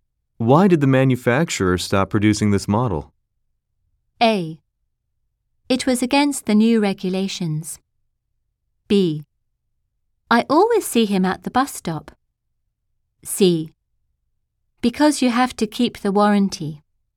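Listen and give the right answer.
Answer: A: It was against the new regulations.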